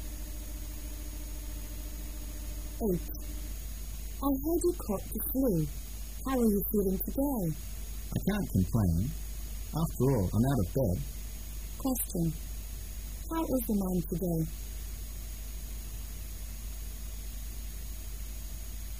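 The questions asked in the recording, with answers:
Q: How is the man today?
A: Better; he is out of bed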